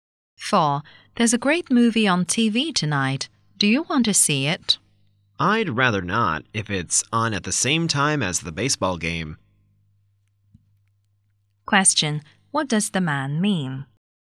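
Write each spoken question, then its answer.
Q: What does the man mean?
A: He would rather watch the baseball game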